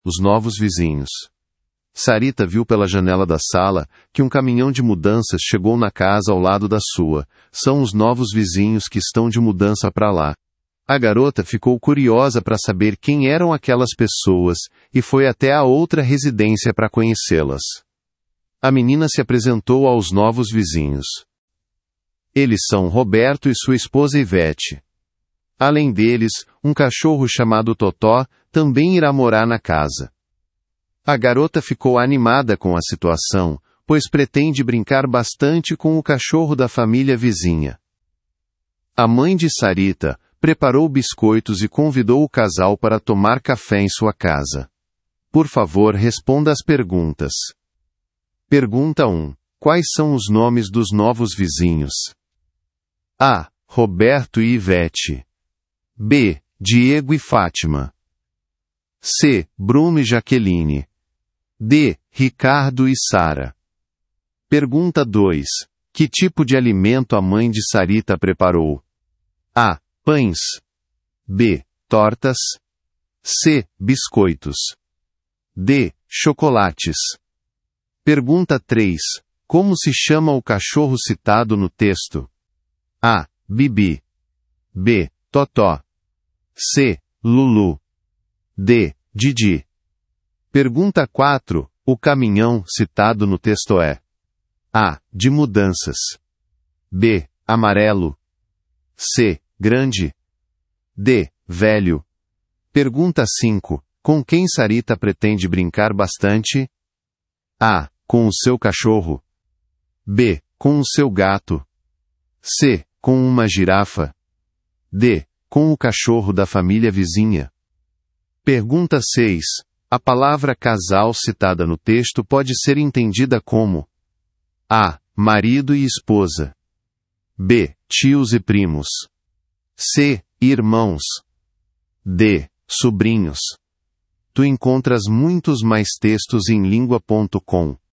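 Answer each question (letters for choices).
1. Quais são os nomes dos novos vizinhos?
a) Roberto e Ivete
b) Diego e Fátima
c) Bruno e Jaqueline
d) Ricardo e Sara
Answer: a

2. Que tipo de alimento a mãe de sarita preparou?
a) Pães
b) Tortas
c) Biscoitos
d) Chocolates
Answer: c

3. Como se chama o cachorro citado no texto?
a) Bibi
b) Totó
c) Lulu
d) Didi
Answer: b

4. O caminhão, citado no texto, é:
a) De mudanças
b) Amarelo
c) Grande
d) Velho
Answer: a

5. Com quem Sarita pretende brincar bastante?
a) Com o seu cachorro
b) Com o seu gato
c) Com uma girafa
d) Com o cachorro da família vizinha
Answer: d

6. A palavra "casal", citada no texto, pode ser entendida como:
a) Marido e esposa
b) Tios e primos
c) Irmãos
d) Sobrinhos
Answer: a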